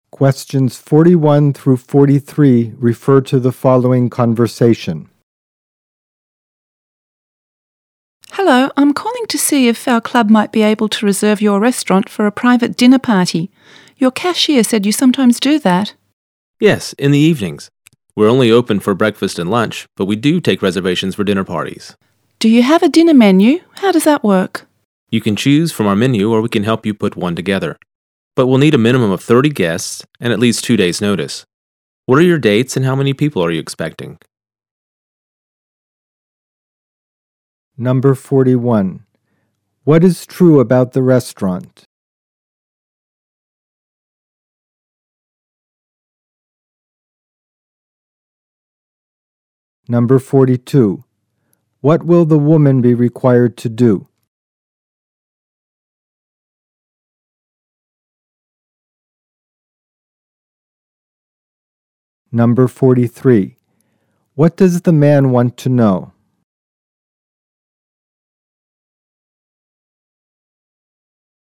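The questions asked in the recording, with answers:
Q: What is true about the restaurant?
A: It is usually open only for breakfast and lunch, but it takes reservations for dinner parties.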